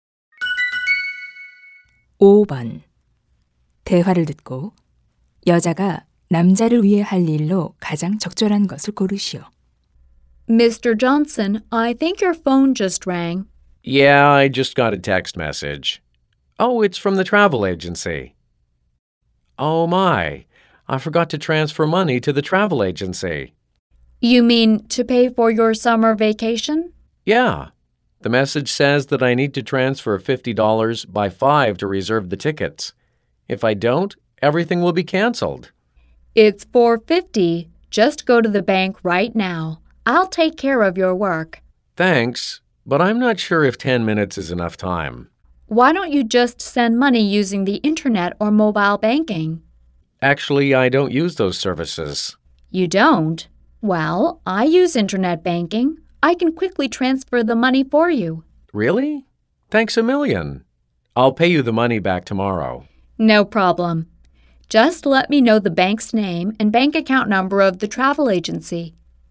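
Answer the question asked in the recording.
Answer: 인터넷 뱅킹으로 여행사에 송금하기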